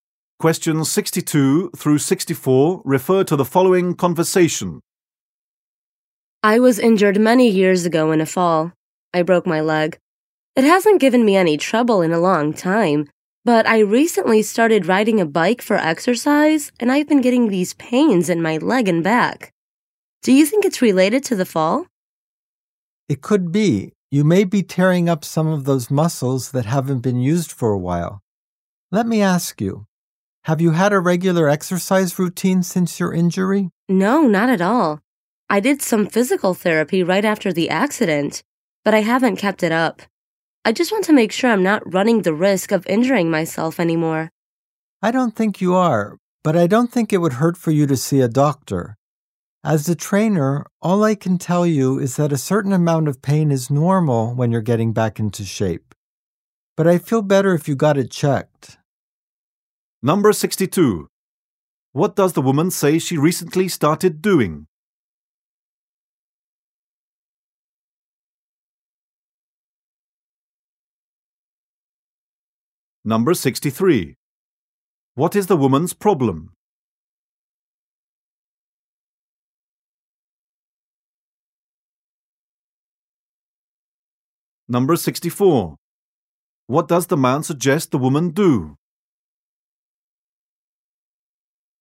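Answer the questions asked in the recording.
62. Riding a bike for exercise
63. Pain in her leg and back
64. See a doctor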